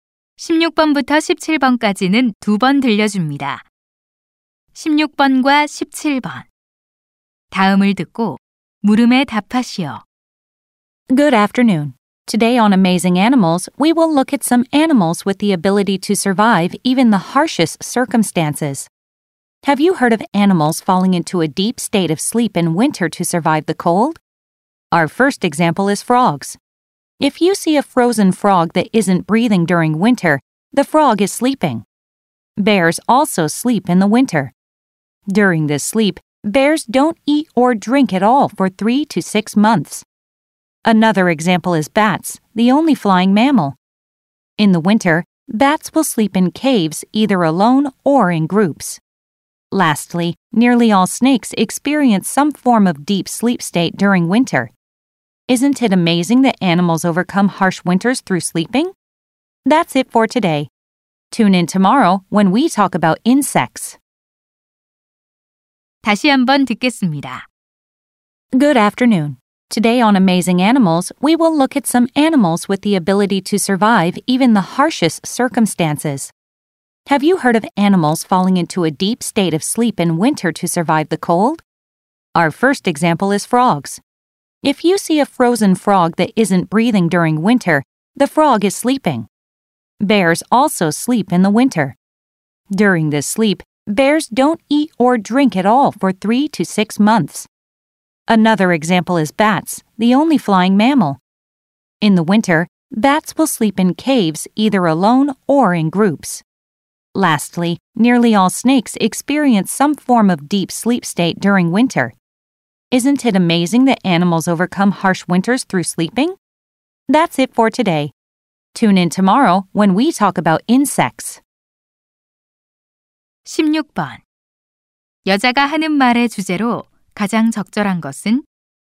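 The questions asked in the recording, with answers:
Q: 여자가 하는 말의 주제로 가장 적절한 것은?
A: 겨울잠을 자며 혹독한 겨울을 이겨 내는 동물들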